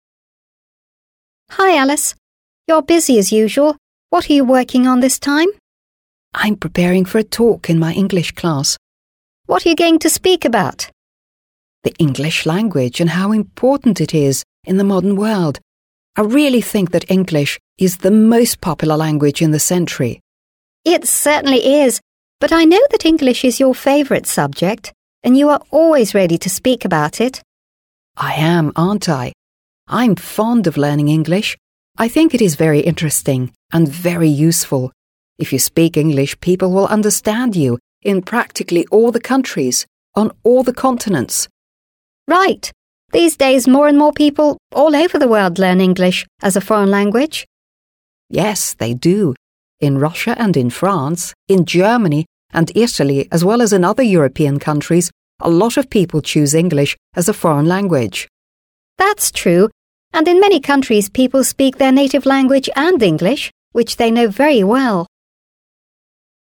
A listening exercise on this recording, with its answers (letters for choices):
Listen to the dialogue and complete these sentences.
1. Alice says that she is going to ... .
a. have her English class tomorrow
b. have a talk about her English class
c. have a talk in her English class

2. Alice thinks that English is the most popular language in our century. Diana ... .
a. is not sure of it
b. thinks the same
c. doesn't think so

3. Alice is sure that if you know English, you'll be able to understand people ... .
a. in your own country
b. in very few countries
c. in practically all the countries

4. Diana says that these days ... .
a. a great number of people are interested in learning English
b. very few people are interested in learning English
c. in many countries people can't speak English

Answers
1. c
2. b
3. c
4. a

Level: 7 класс